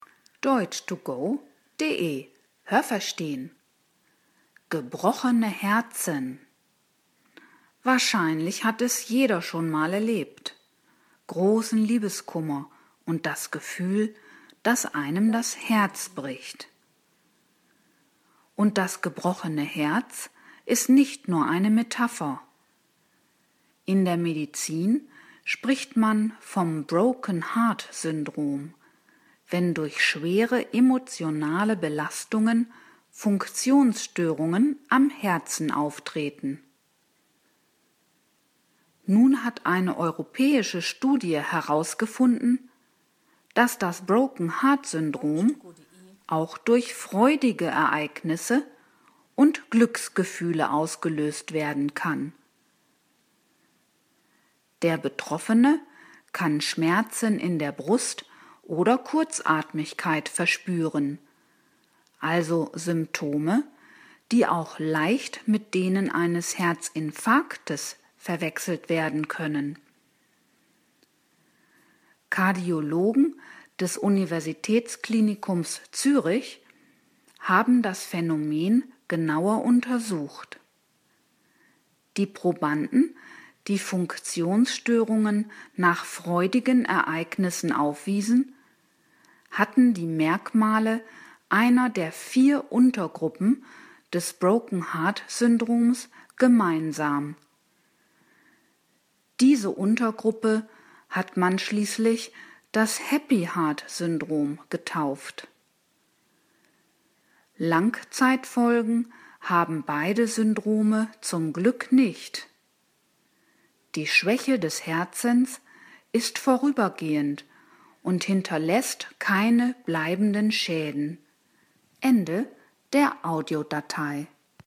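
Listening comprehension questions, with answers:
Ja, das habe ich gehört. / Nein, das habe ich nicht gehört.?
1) Das „gebrochene Herz" ist nur eine Metapher.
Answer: Nein, das habe ich nicht gehört.

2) Das Broken-Heart-Syndrom kann bei schweren emotionalen Belastungen auftreten.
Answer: Ja, das habe ich gehört.

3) Das Broken-Heart-Syndrom löst Herzinfarkte aus.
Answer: Nein, das habe ich nicht gehört.

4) Auch freudige Ereignisse und Glücksgefühle können zu Funktionsstörungen des Herzens führen.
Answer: Ja, das habe ich gehört.

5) Herzspezialisten in Zürich haben die Zusammenhänge zwischen Funktionsstörungen des Herzens und freudigen Ereignissen im Leben von Menschen untersucht.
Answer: Ja, das habe ich gehört.

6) Das Broken-Heart-Syndrom weist drei Untergruppen auf.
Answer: Nein, das habe ich nicht gehört.

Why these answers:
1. Die Medizin verwendet den Begriff „Broken-Heart-Syndrom" für die Beschreibung bestimmter Funktionsstörungen des Herzens.
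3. Die Symptome können denen eines Infarktes ähneln.

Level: B2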